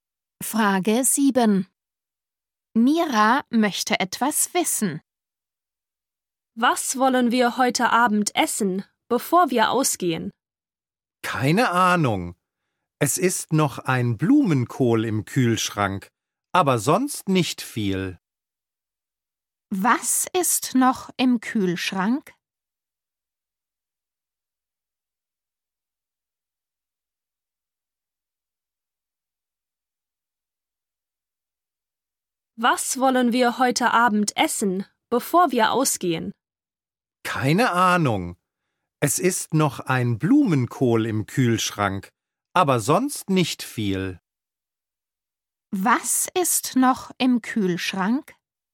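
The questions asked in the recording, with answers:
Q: Was ist noch im Kühlschrank?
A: ein Blumenkohl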